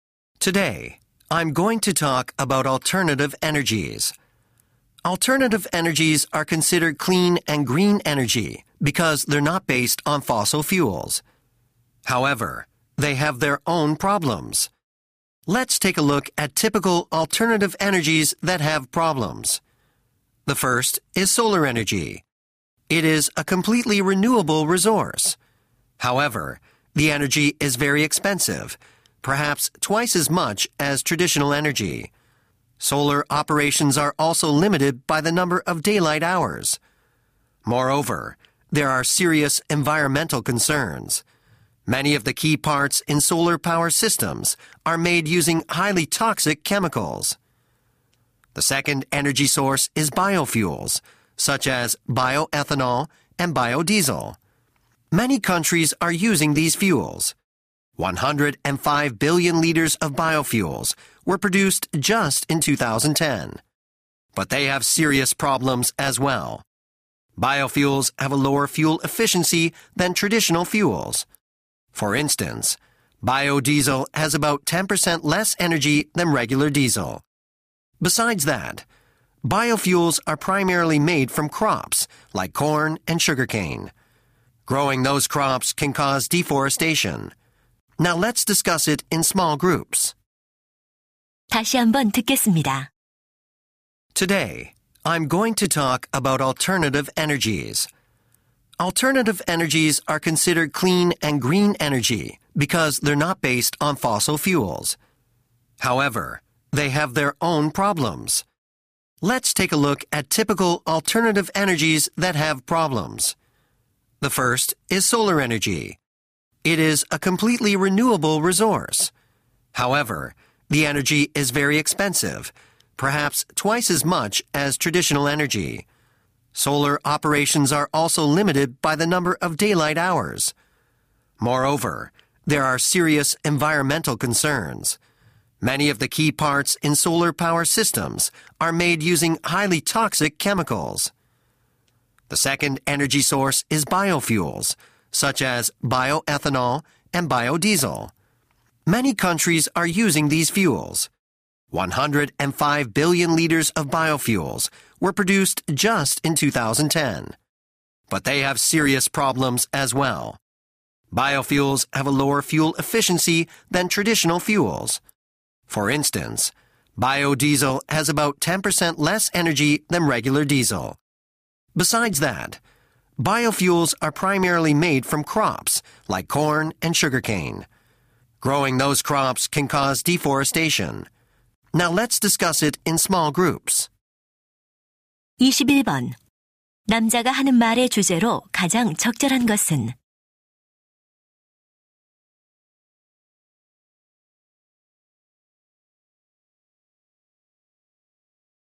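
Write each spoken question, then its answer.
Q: 남자가 하는 말의 주제로 가장 적절한 것은?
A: 대체 에너지의 문제점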